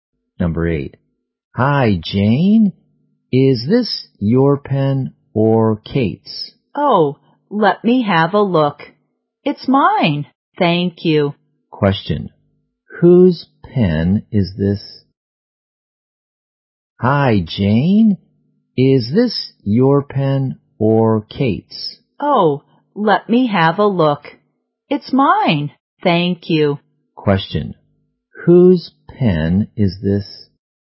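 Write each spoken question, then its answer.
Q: Question. Whose pen is this?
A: Jane's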